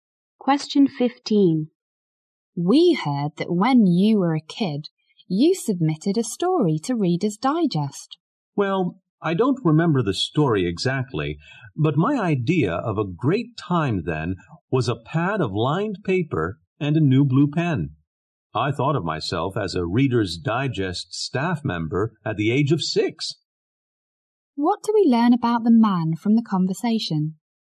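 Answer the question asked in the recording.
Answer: He loved writing even as a young child.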